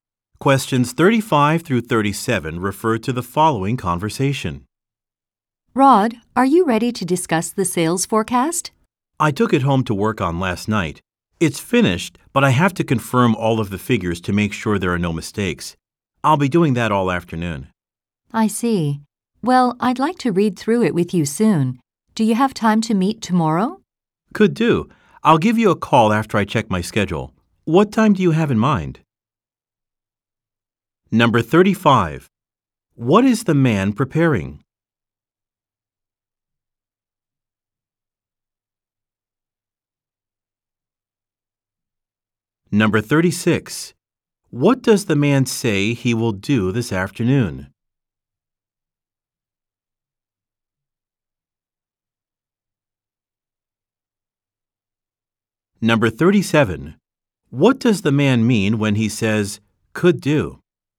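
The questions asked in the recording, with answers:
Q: What is the man preparing?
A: A sales forecast

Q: What does the man say he will do this afternoon?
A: Check all the figures to make sure there are no mistakes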